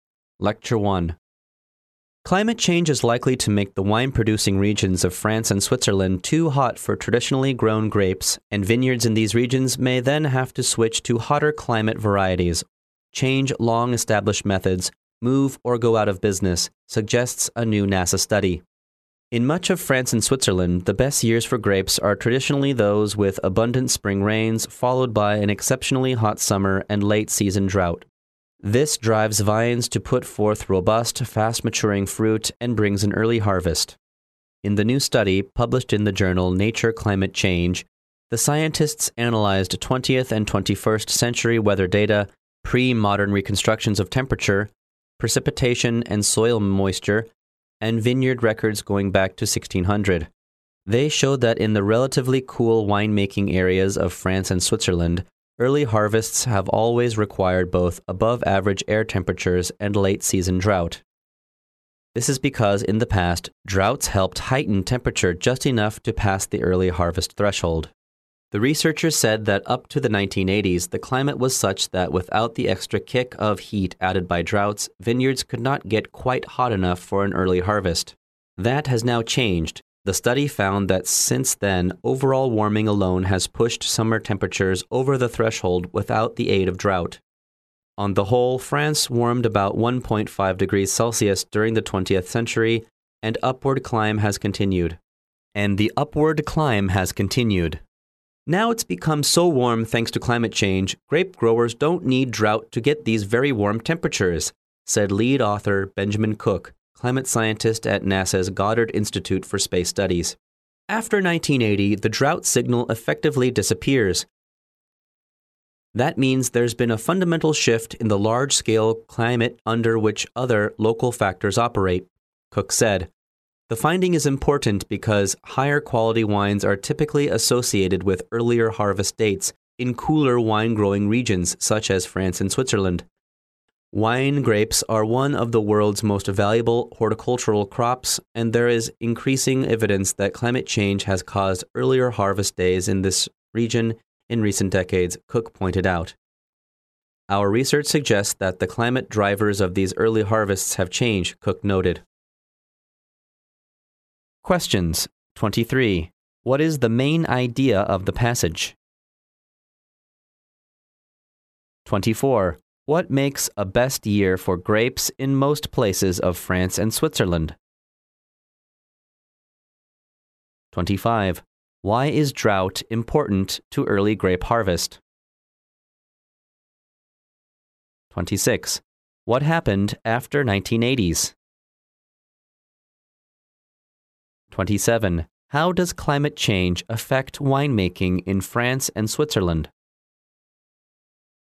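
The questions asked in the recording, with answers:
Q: What makes a best year for grapes in most places of France and Switzerland?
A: Plenty of spring rain, then an exceptionally hot summer and late-season drought

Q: Why is drought important to early grape harvest?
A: Drought raised temperatures just enough to pass the early harvest threshold

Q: What happened after 1980s?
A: Warming alone pushed summer temperatures over the threshold without drought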